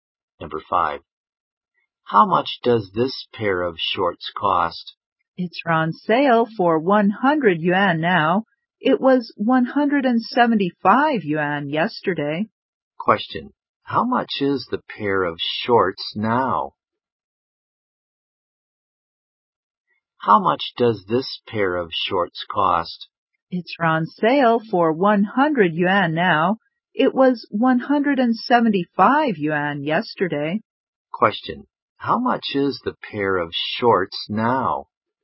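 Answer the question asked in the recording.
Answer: 100 yuan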